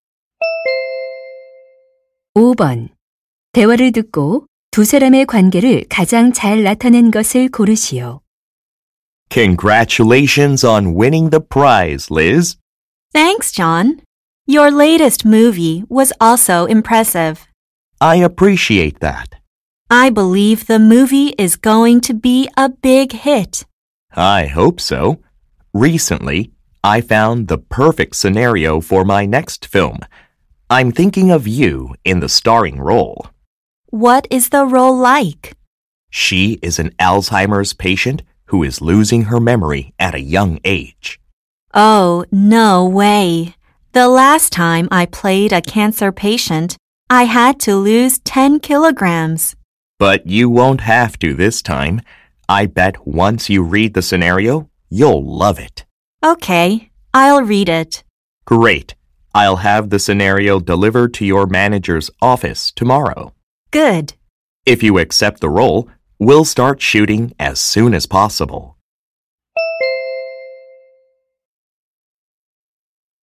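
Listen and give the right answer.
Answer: 영화감독 - 배우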